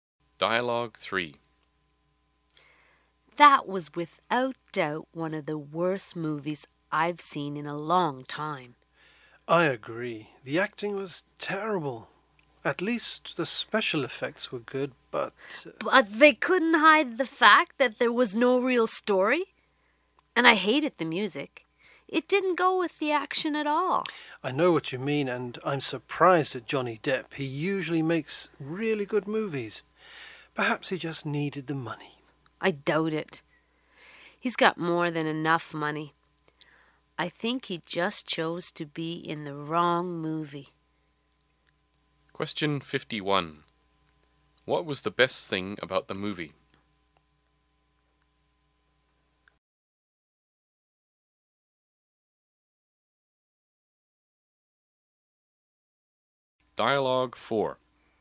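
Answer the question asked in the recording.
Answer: The special effects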